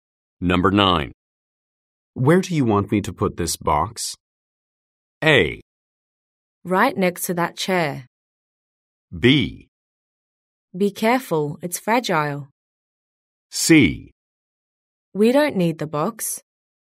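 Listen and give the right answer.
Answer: A: Right next to that chair.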